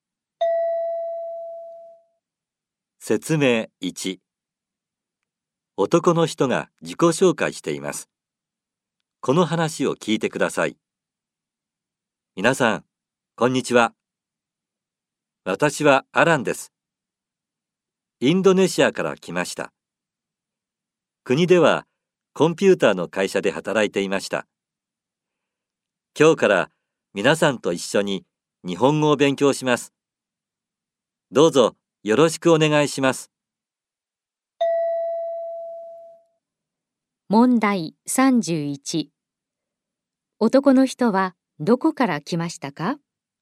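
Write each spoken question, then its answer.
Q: 男の人はどこから来ましたか?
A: インドネシア

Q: 今日から何を勉強しますか?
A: 日本語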